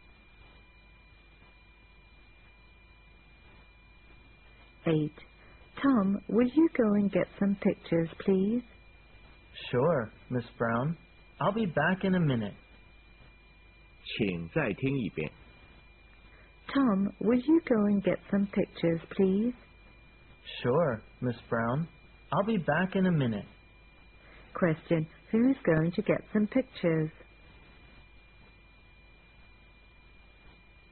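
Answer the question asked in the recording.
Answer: Tom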